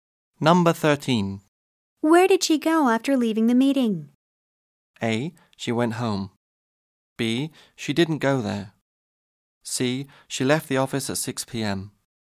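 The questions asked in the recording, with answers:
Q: Where did she go after leaving the meeting?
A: A: She went home.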